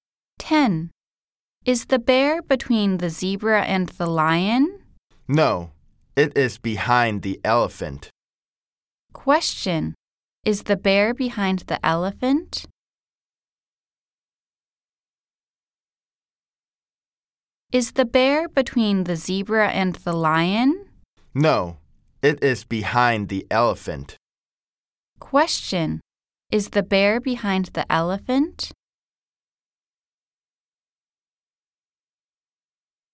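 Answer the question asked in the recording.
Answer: Yes, it is.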